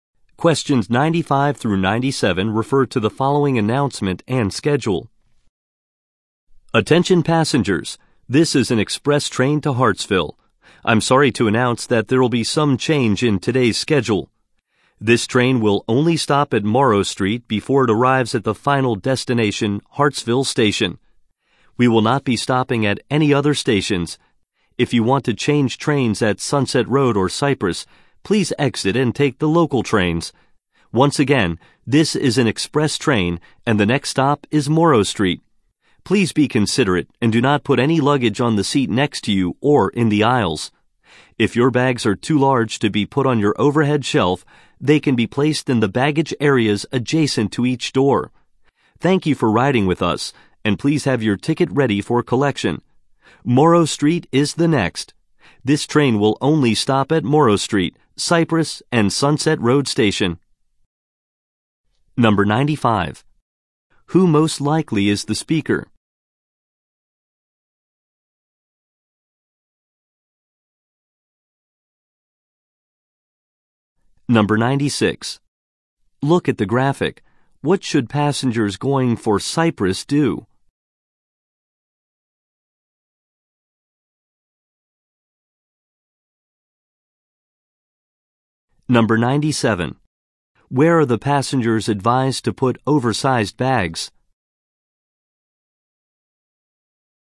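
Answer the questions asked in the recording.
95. A train conductor
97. In the baggage areas next to each door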